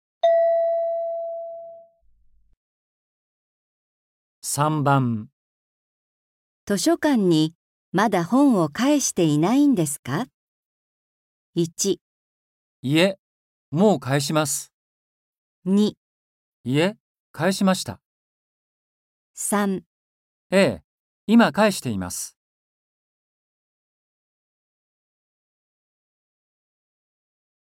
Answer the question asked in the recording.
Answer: 2

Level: N4.42